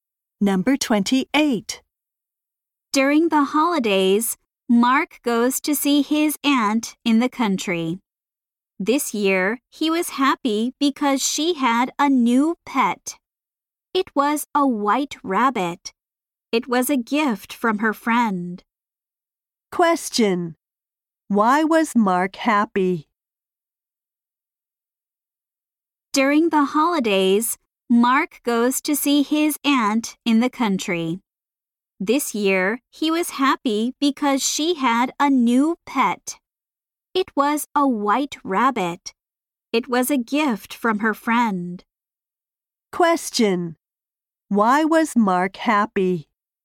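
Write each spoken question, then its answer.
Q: Why was Mark happy?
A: His aunt had a new pet (a rabbit).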